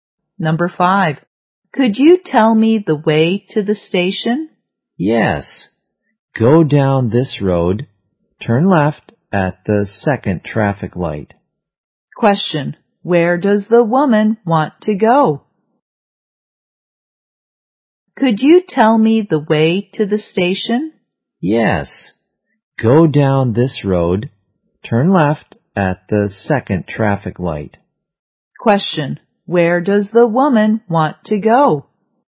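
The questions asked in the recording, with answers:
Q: where does the woman want to go?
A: The station.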